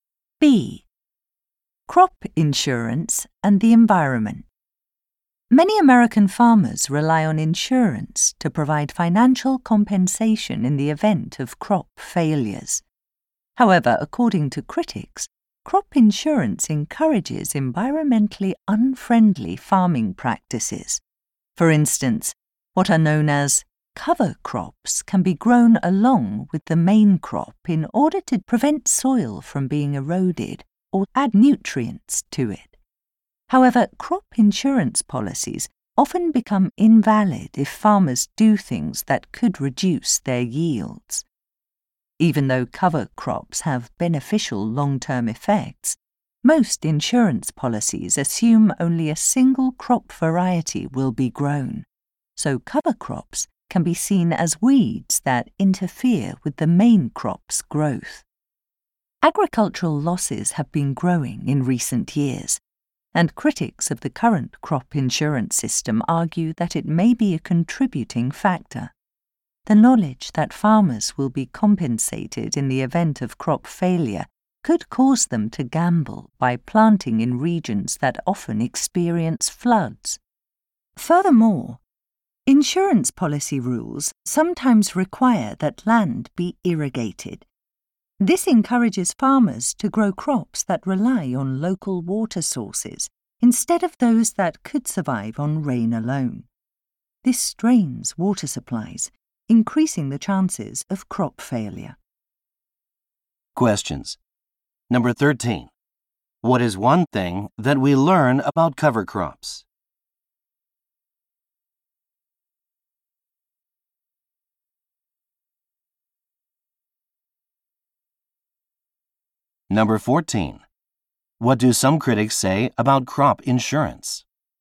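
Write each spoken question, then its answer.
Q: What is one thing that we learn about cover crops?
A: They prevent soil erosion or add nutrients but can void insurance policies

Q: What do some critics say about crop insurance?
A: It may contribute to growing agricultural losses by encouraging risky farming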